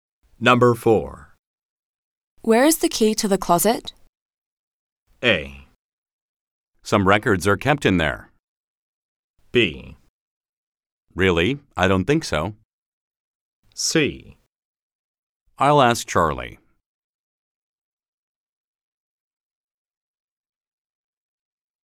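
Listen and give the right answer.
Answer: C: I'll ask Charlie.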